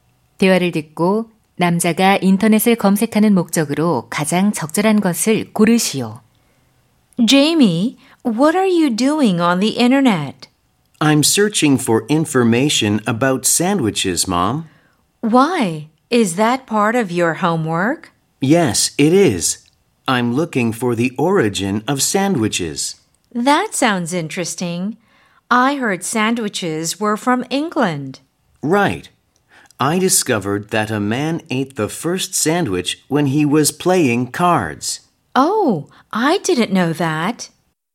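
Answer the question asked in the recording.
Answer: 샌드위치의 기원을 조사하는 숙제를 하기 위해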